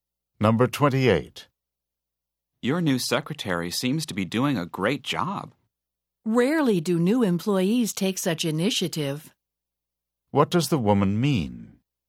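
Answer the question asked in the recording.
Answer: New employees seldom take this much initiative.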